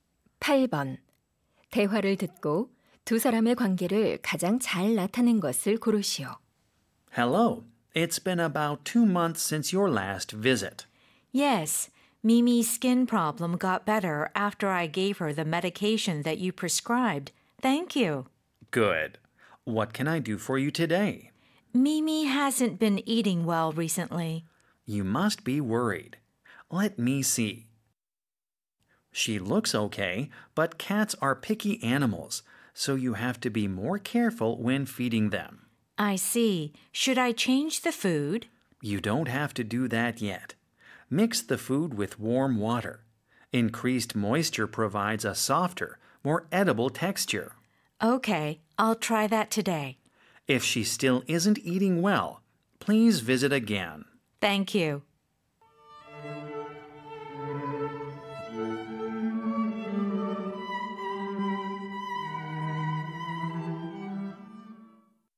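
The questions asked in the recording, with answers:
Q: 대화를 듣고 두 사람의 관계를 가장 잘 나타낸 것을 고르시오.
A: 수의사 - 반려묘 주인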